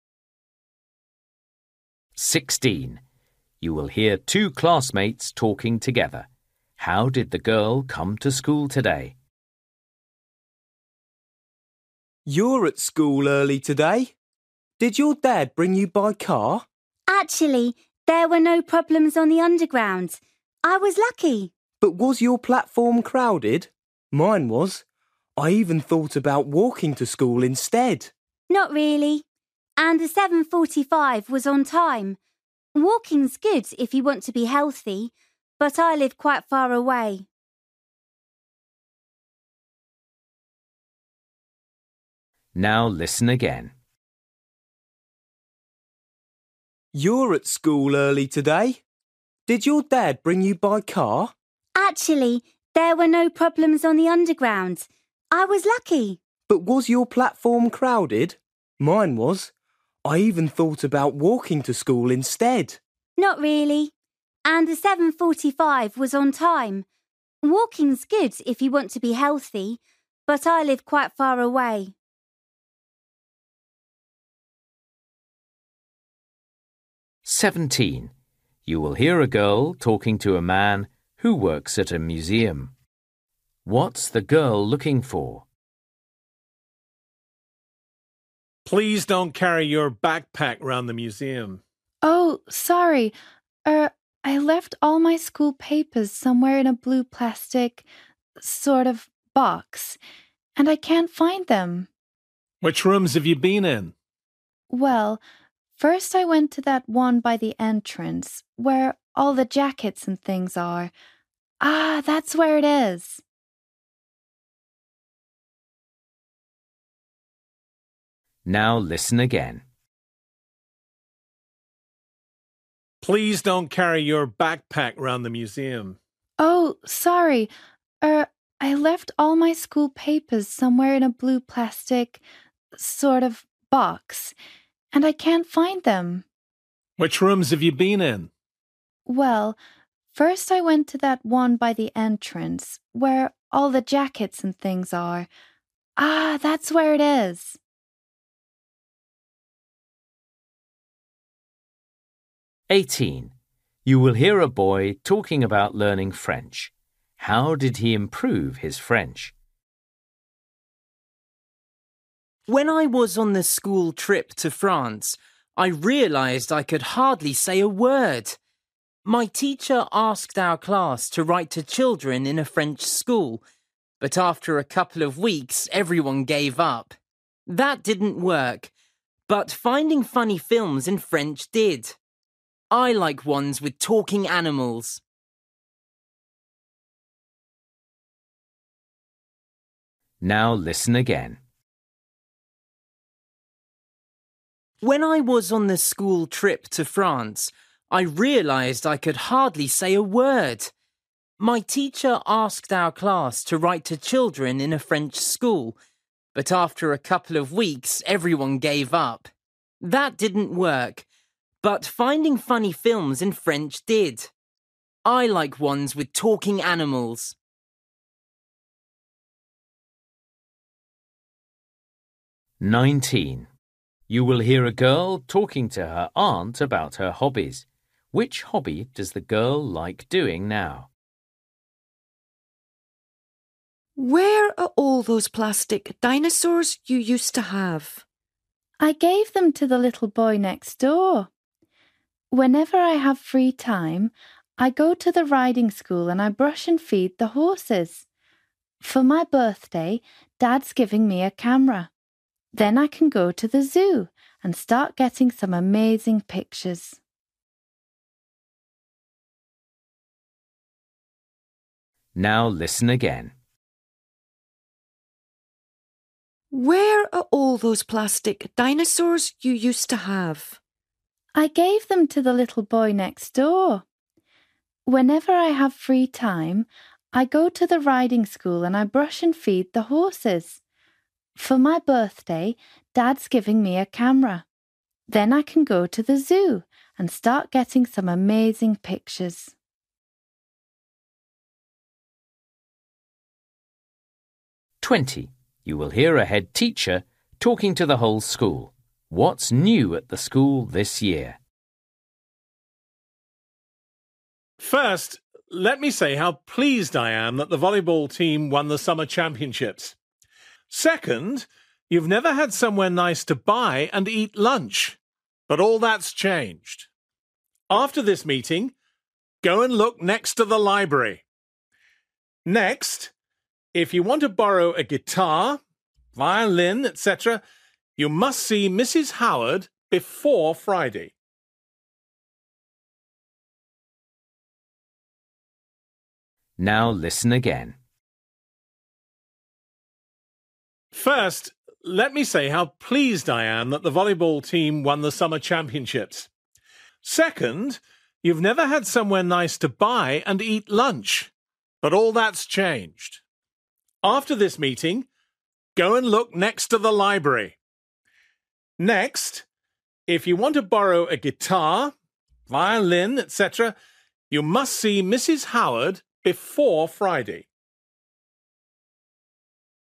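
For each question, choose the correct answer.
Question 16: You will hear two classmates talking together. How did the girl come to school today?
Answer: By underground (train)

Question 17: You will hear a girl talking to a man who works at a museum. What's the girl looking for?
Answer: A blue plastic box with her school papers

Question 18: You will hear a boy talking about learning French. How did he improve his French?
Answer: By watching funny films in French

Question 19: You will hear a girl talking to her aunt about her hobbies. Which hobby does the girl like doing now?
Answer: Looking after horses at the riding school

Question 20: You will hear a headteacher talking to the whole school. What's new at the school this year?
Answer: A place to buy and eat lunch (next to the library)

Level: Luyện nghe trình độ A2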